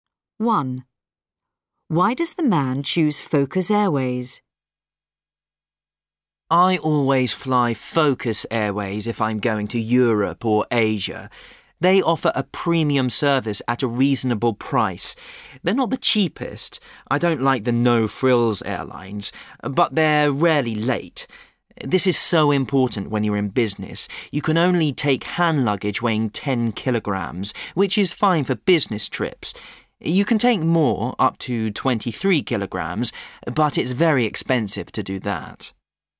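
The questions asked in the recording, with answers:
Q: Why does the man choose Focus Airways?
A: Its flights are rarely late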